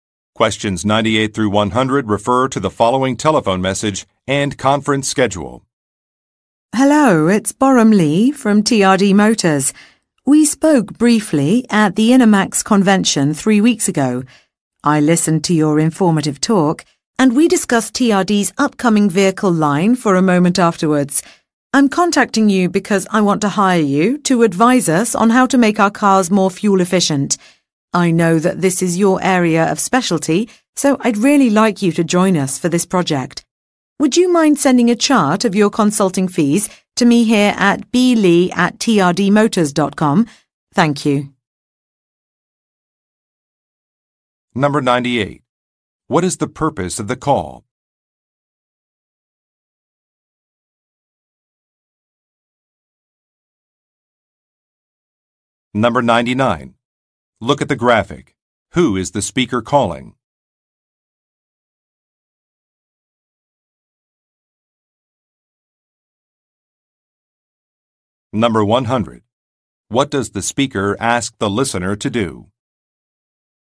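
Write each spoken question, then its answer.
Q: What is the purpose of the call?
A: To hire the listener to advise on making cars more fuel efficient

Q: What does the speaker ask the listener to do?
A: Send a chart of consulting fees by email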